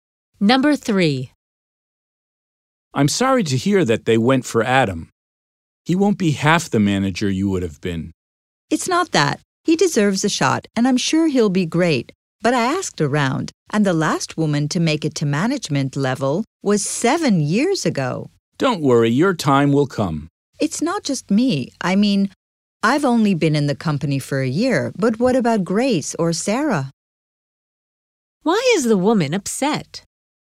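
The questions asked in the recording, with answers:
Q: Why is the woman upset?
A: Women rarely get promoted to management there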